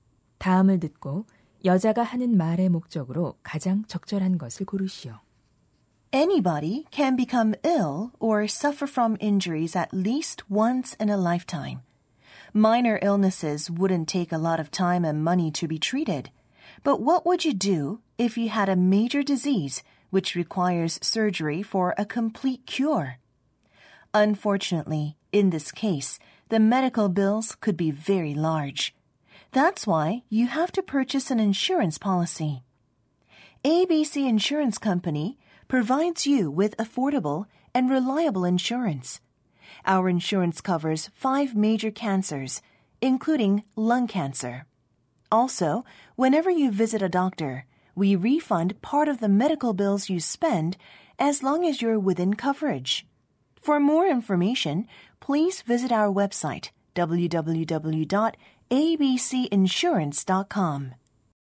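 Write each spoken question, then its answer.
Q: 다음을 듣고 여자가 하는 말의 목적으로 가장 적절한 것을 고르시오.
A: 보험 상품을 홍보하려고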